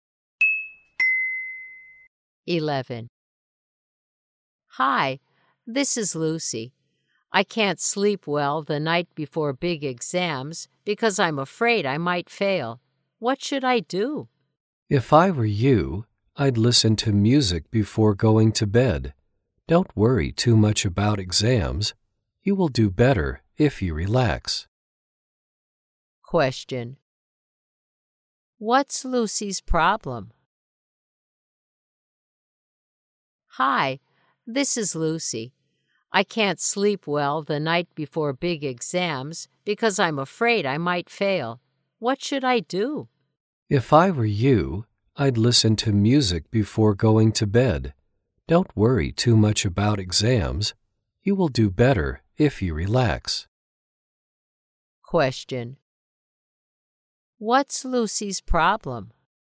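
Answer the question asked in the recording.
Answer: She can't sleep well the night before big exams.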